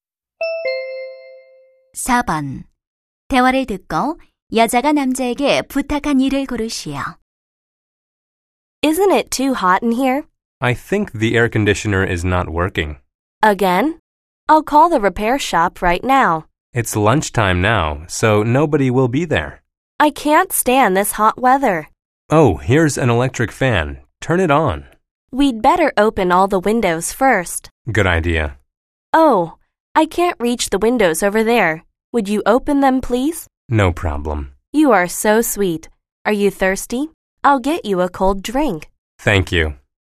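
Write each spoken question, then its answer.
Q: 대화를 듣고 여자가 남자에게 부탁한 일을 고르시오.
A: 창문 열기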